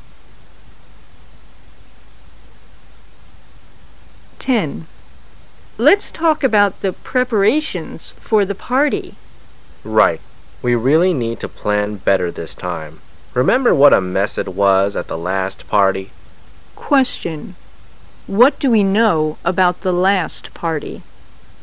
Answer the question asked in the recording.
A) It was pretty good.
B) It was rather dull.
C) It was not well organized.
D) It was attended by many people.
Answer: C) It was not well organized.

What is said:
[解析] W: Let's talk about the preparations for the party. M: Right, we really need to plan better this time. Remember what a mess it was at the last party? Q: What do we know about the last party?